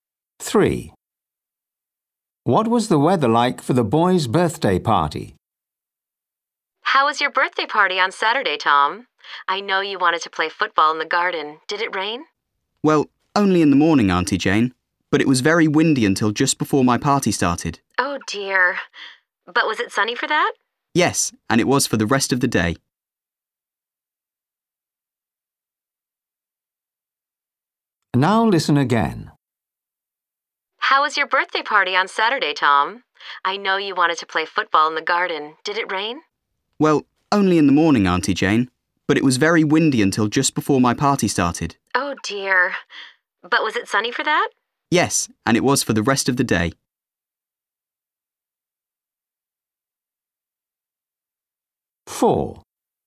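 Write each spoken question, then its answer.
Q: What was the weather like for the boys' birthday party?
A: sunny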